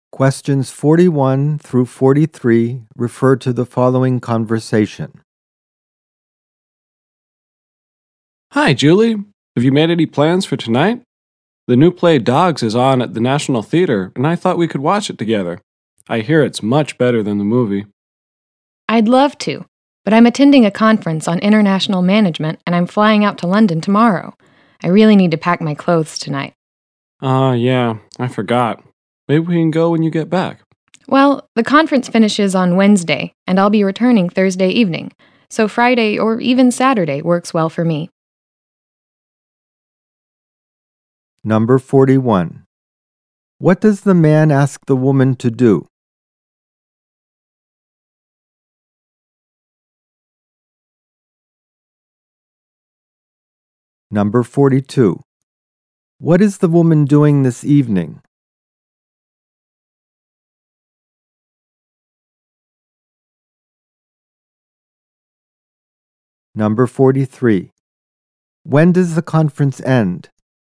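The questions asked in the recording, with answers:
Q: What does the man ask the woman to do?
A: Watch the play Dogs with him tonight

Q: What is the woman doing this evening?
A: Packing her clothes for a trip to London

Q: When does the conference end?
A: On Wednesday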